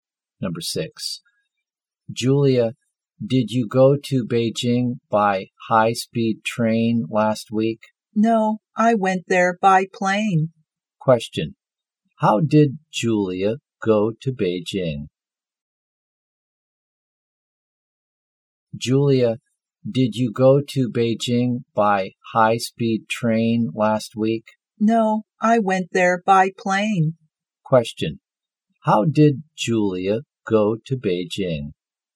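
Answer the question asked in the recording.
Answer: By plane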